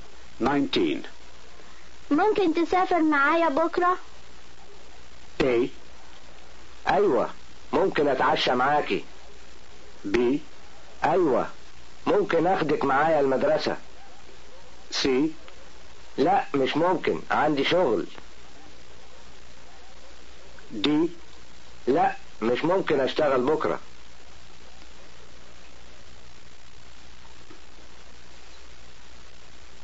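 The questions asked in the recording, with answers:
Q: ممكن تسافر معايا بكرة؟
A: C: لا مش ممكن عندي شغل.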